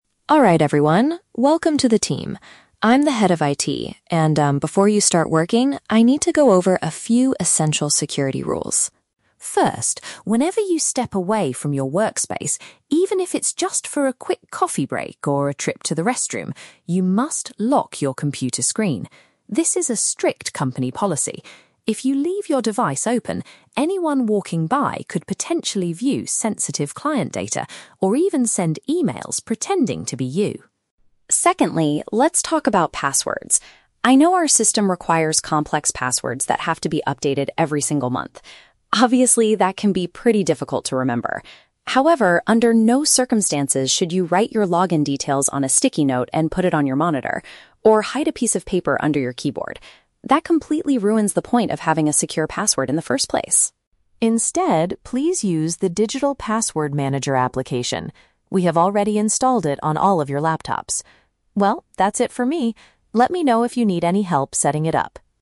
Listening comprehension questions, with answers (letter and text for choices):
Listen to the IT Manager giving a short presentation to new employees, and choose the correct answer (A, B, or C) for each question.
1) What is the mandatory rule when an employee leaves their desk?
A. They must shut down their computer completely to save power.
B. They are required to secure their display so others cannot access it.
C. They should ask a nearby coworker to watch their equipment.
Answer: B. They are required to secure their display so others cannot access it.

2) Why might employees find it difficult to manage their passwords, according to the speaker?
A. Because the passwords must be complicated and changed frequently.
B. Because the IT department assigns random words they cannot choose.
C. Because they are not allowed to use the same password on different websites.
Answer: A. Because the passwords must be complicated and changed frequently.

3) What does the manager recommend for handling passwords?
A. Keep them hidden safely underneath the computer keyboard.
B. Write them down on small pieces of paper to memorize them.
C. Utilize a specific piece of software provided by the company.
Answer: C. Utilize a specific piece of software provided by the company.

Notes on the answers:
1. The manager says, "you must lock your computer screen." Option B uses the synonyms "secure their display" to paraphrase this rule. Why the traps are wrong: Option A is a trap; the manager says to lock the screen, not shut down (turn off) the computer. Option C is a plausible office behavior, but it is never mentioned in the audio.
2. The manager states that the system requires "complex passwords that have to be updated every single month." Option A is a direct paraphrase of this statement. Why the traps are wrong: Option B and Option C are both very common internet security rules, but the speaker does not mention them in this specific monologue.
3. The manager tells the staff to "use the digital password manager application" that is already installed on their laptops. Option C paraphrases this as a "specific piece of software provided by the company." Why the traps are wrong: Option A and Option B are traps. The manager mentions putting notes on monitors or hiding paper under the keyboard as things the employees must never do ("under no circumstances").

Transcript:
IT Manager: Alright everyone, welcome to the team. I'm the head of IT, and um, before you start working, I need to go over a few essential security rules.
First, whenever you step away from your workspace, even if it's just for a quick coffee break or a trip to the restroom, you must lock your computer screen. This is a strict company policy. If you leave your device open, anyone walking by could potentially view sensitive client data or even send emails pretending to be you.
Secondly, let's talk about passwords. I know our system requires complex passwords that have to be updated every single month. Obviously, that can be pretty difficult to remember. However, under no circumstances should you write your login details on a sticky note and put it on your monitor, or hide a piece of paper under your keyboard. That completely ruins the point of having a secure password in the first place!
Instead, please use the digital password manager application. We have already installed it on all of your laptops. Well, that's it from me. Let me know if you need any help setting it up.